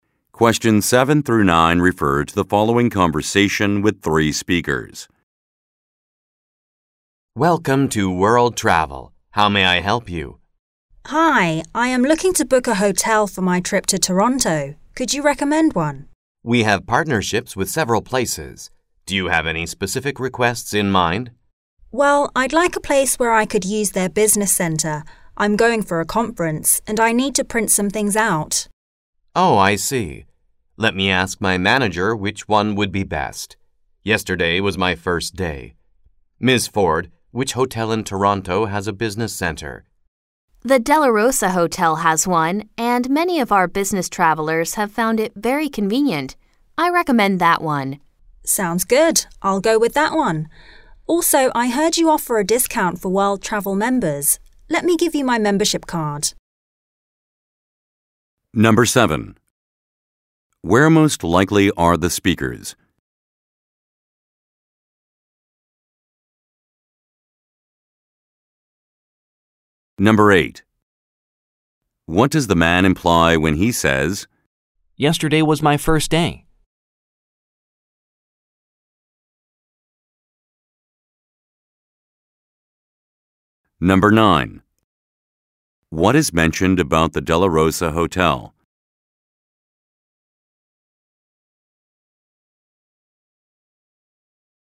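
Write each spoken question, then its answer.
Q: Where most likely are the speakers?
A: At a travel agency (World Travel)

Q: What does the man imply when he says, "Yesterday was my first day"?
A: He is new and unfamiliar with the hotels, so he needs to ask his manager

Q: What is mentioned about the Della Rosa Hotel?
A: It has a business center that business travelers find convenient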